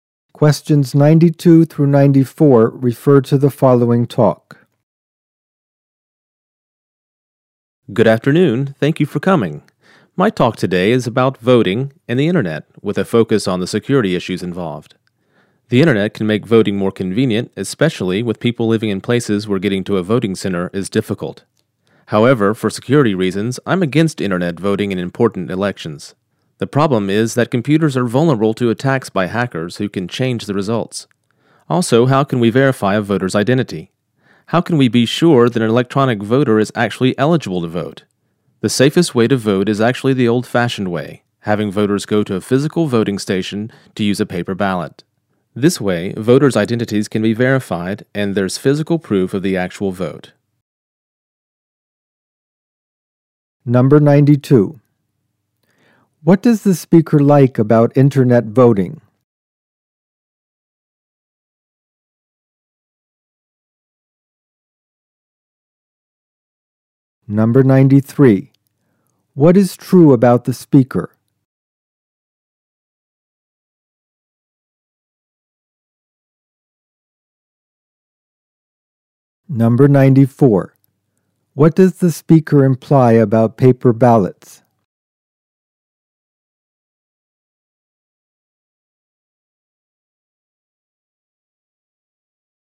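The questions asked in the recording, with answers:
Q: What does the speaker like about internet voting?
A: It is convenient, especially for people far from voting centers

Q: What does the speaker imply about paper ballots?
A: They are the safest way to vote, since voters' identities can be checked and there is physical proof of the vote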